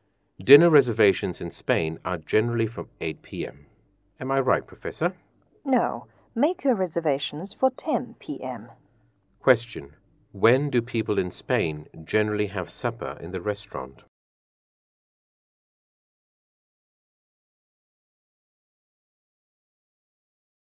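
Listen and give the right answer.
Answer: At 10 p.m.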